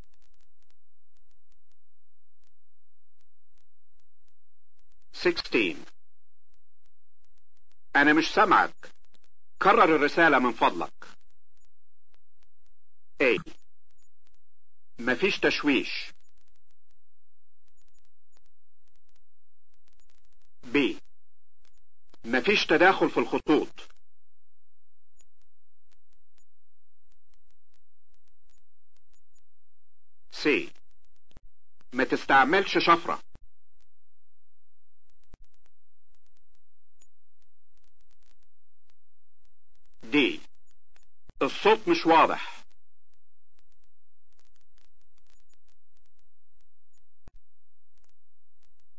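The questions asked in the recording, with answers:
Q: أنا مش سمعك. كرر الرسالة من فضلك.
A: D: الصوت مش واضح.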